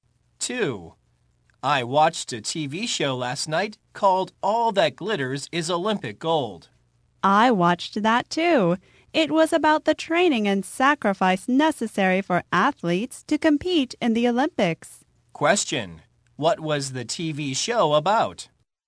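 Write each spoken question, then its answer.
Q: What was the TV show about?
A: The training and sacrifice necessary for athletes to compete in the Olympics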